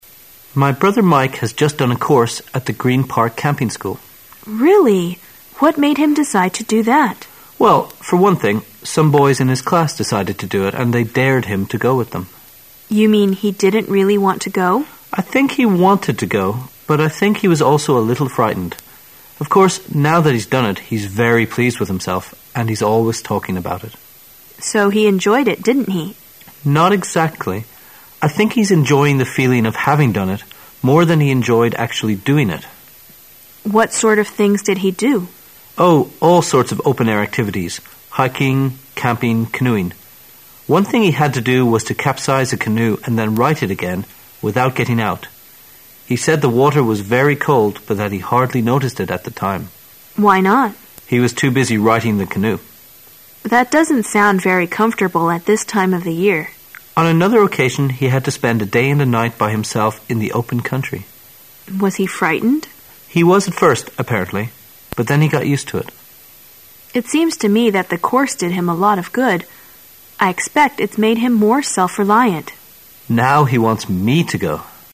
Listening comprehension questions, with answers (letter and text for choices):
Questions 1 to 3are based on the following conversation. At the end of the conversation, you will be given 15 seconds to answer the questions. Now listen to the conversation.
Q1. What can we infer about Mike before he went to the camping school?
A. He was eager to do the course.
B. He had done outdoor activities.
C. He enjoyed life in the open country.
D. He was reluctant and timid.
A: D. He was reluctant and timid.

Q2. Mike participated in all the following activities EXCEPT ______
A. hiking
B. canoeing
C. swimming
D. camping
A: C. swimming

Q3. Which of the following words can best describe Mike after the course at the camping school?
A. Independent.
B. Happy.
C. Determined.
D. Robust.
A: A. Independent.

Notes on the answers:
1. 本题测试推测理解能力。根据相关信息"they dared him to go","he was also a little frightened''等可推测Mike是在别人的怂恿下才参加该野营课程,而且他还有点胆怯(timid),因此正确答案为D。 dare sb.to do sth.激某人做某事,挑战 如:He dared me to jump over the stream. 他激我跳过小溪。
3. 本题测试推测理解能力。根据文中的相关信息"it's made him more self-reliant",可以推测Mike在参加野营课程后变得更加独立了,因此正确答案为A。 self-reliant adj.靠自己力量的,自力更生的

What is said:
[解析] 1-3 M:My beother Mike has just done a course at the Creen Park Camping School W: Really! What made him decide to do that? M: Well, for one thing, some boys in his class decided to do it and they dared him to go with them! W: You mean he didn't really want to go? M: I think he wanted to go but I think he was also a little frightened. Of course, now that he's done it, he's very pleased with himself and he's always talking about it. W: So he enjoyed it, didn't he? M: Not exactly. I think he's enjoying the feeling of having done it more than he enjoyed actually doing it! W: What sort of things did he do? M: Oh, all sorts of open-air activities: hiking, camping, canoeing. One thing he had to do was to capsize a canoe and then right it again without getting out. He said the water was very cold but hat he hardly noticed it at the time. W: Why not? M: He was too busy righting the canoe. W: That doesn't sound very comfortable at this time of the year. M: On another occasion he had to spend a day and a night by himself in the open country. W: Was he frightened? M: He was at first, apparently, but then he got used to it. W: It seems to me that the course did him a lot of good. I expect it's made him more self-reliant. M: Now he wants me to go!